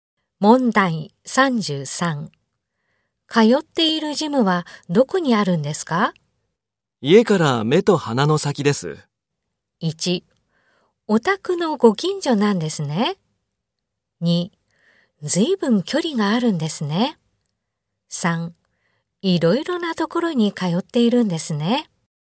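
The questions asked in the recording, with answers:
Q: 通っているジムはどこにあるんですか?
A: 1: お宅のご近所なんですね。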